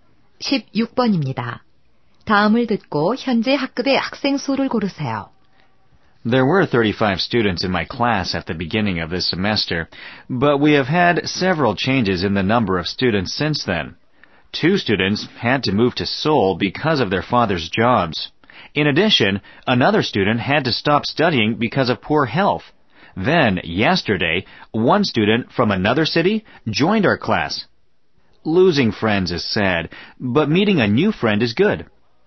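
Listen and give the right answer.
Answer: 33명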